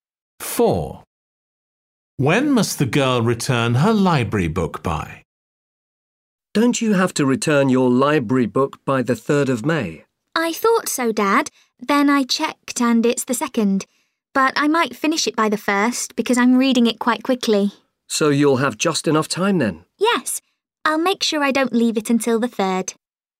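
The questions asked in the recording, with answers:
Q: When must the girl return her library book by?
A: the 2nd of May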